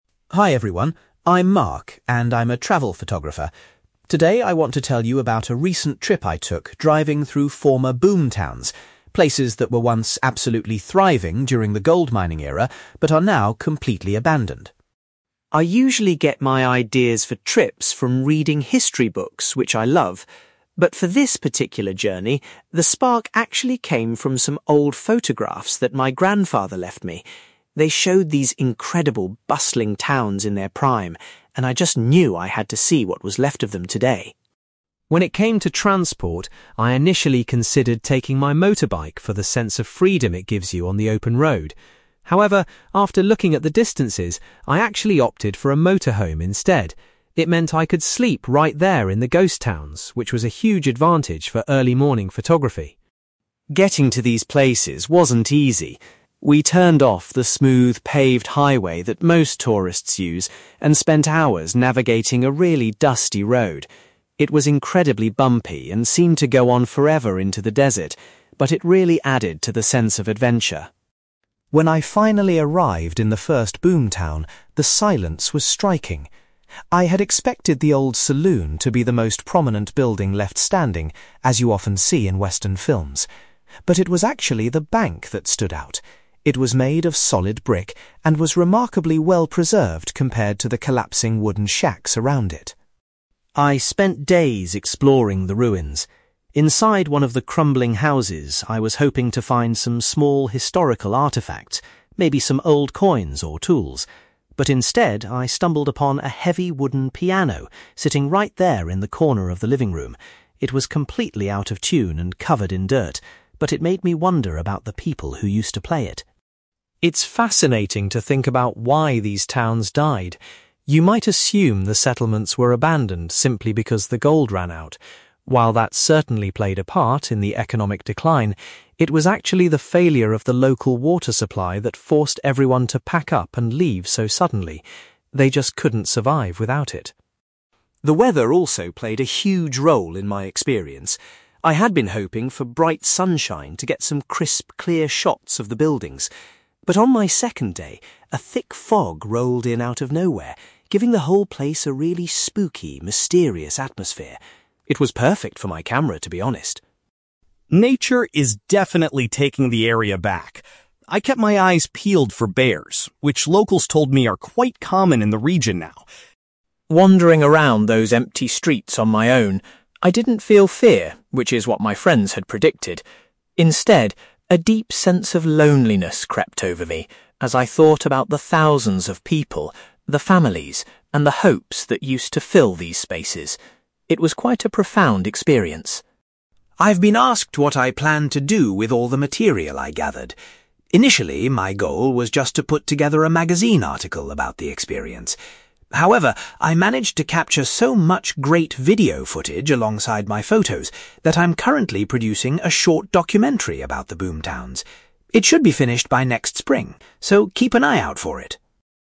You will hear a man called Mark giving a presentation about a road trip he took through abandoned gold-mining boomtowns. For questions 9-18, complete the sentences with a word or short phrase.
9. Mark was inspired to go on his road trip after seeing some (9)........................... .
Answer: photographs

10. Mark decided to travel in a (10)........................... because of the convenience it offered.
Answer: motorhome

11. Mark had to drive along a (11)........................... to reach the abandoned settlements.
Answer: dusty road

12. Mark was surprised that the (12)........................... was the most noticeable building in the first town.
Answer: bank

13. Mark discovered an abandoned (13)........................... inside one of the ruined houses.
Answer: piano

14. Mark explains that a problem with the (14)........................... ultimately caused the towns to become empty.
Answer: water supply

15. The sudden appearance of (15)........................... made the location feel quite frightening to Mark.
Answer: thick fog

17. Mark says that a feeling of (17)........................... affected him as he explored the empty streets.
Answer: loneliness

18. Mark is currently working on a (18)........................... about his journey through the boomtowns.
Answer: documentary

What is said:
Mark: Hi everyone. I'm Mark, and I'm a travel photographer. Today I want to tell you about a recent trip I took driving through former boomtowns—places that were once absolutely thriving during the gold mining era, but are now completely abandoned.
I usually get my ideas for trips from reading history books, which I love. But for this particular journey, the spark actually came from some old photographs that my grandfather left me. They showed these incredible, bustling towns in their prime, and I just knew I had to see what was left of them today.
When it came to transport, I initially considered taking my motorbike for the sense of freedom it gives you on the open road. However, after looking at the distances, I actually opted for a motorhome instead. It meant I could sleep right there in the ghost towns, which was a huge advantage for early morning photography.
Getting to these places wasn't easy. We turned off the smooth, paved highway that most tourists use, and spent hours navigating a really dusty road. It was incredibly bumpy and seemed to go on forever into the desert, but it really added to the sense of adventure.
When I finally arrived in the first boomtown, the silence was striking. I had expected the old saloon to be the most prominent building left standing, as you often see in western films. But it was actually the bank that stood out. It was made of solid brick and was remarkably well-preserved compared to the collapsing wooden shacks around it.
I spent days exploring the ruins. Inside one of the crumbling houses, I was hoping to find some small historical artefacts, maybe some old coins or tools. But instead, I stumbled upon a heavy wooden piano sitting right there in the corner of the living room. It was completely out of tune and covered in dirt, but it made me wonder about the people who used to play it.
It's fascinating to think about why these towns died. You might assume the settlements were abandoned simply because the gold ran out. While that certainly played a part in the economic decline, it was actually the failure of the local water supply that forced everyone to pack up and leave so suddenly. They just couldn't survive without it.
The weather also played a huge role in my experience. I had been hoping for bright sunshine to get some crisp, clear shots of the buildings. But on my second day, a thick fog rolled in out of nowhere, giving the whole place a really spooky, mysterious atmosphere. It was perfect for my camera, to be honest.
Nature is definitely taking the area back. I kept my eyes peeled for bears, which locals told me are quite common in the region now.
Wandering around those empty streets on my own, I didn't feel fear, which is what my friends had predicted. Instead, a deep sense of loneliness crept over me as I thought about the thousands of people, the families, and the hopes that used to fill these spaces. It was quite a profound experience.
I've been asked what I plan to do with all the material I gathered. Initially, my goal was just to put together a magazine article about the experience. However, I managed to capture so much great video footage alongside my photos that I'm currently producing a short documentary about the boomtowns. It should be finished by next spring, so keep an eye out for it!

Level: B2